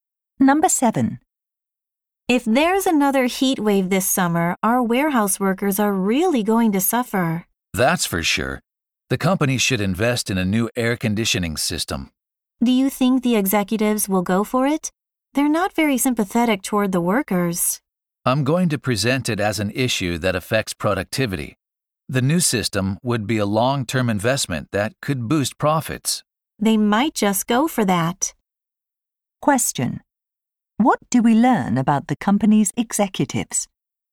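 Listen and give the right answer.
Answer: They care more about profits than about the workers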